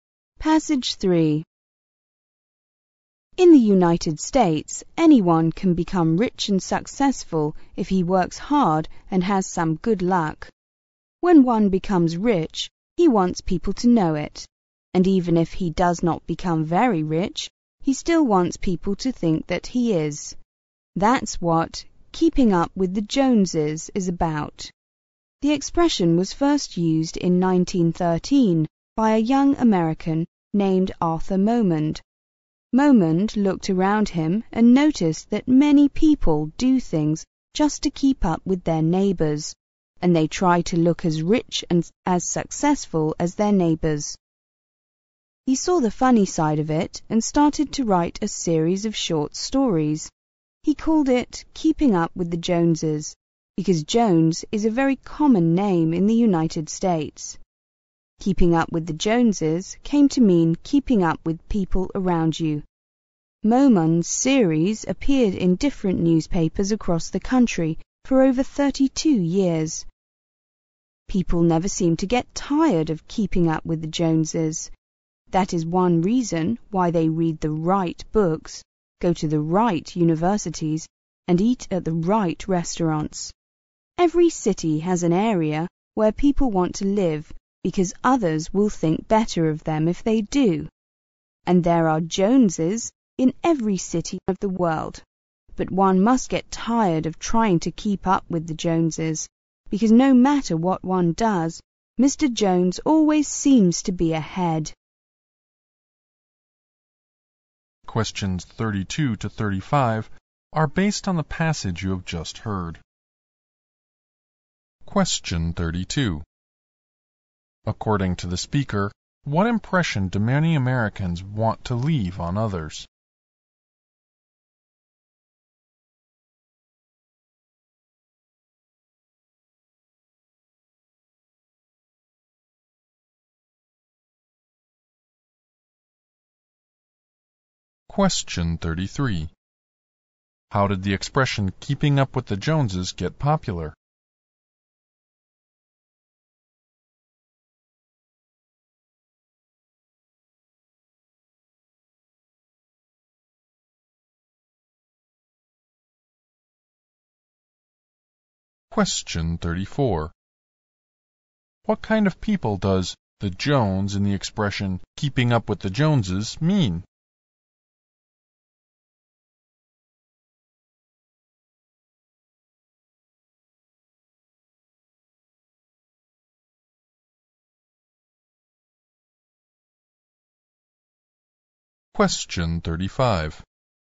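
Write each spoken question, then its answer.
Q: According to the speaker, what impression do many Americans want to leave on others?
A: That they are rich and successful

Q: How did the expression keeping up with the Joneses get popular?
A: Through Momond's series of stories in newspapers

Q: What kind of people does the Jones in the expression keeping up with the Joneses mean?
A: People around you, such as neighbors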